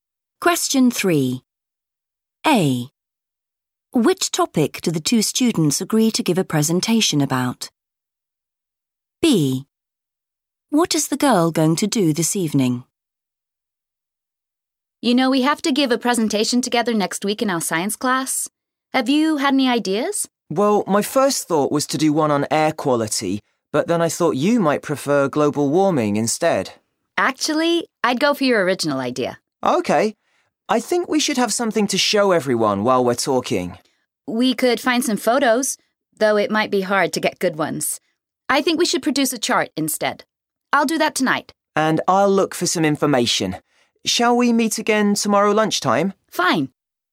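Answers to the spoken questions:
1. air quality
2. produce a chart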